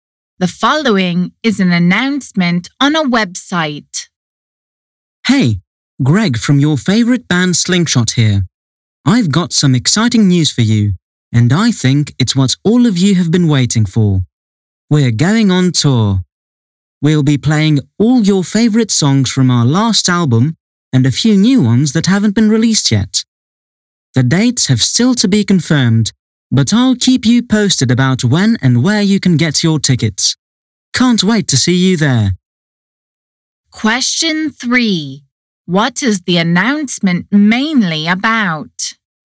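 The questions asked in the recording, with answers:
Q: What is the announcement mainly about?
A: The band is going on tour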